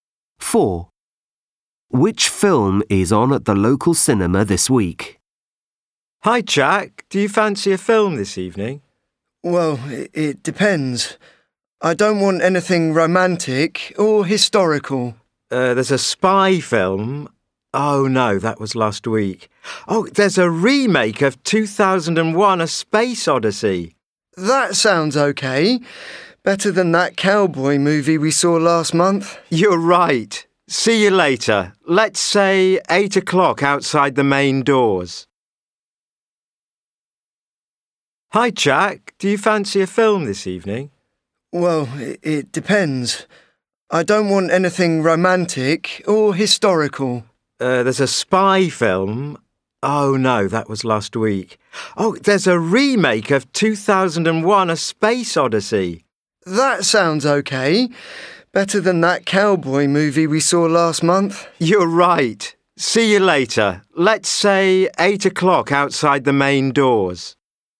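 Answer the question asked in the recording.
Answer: A remake of 2001: A Space Odyssey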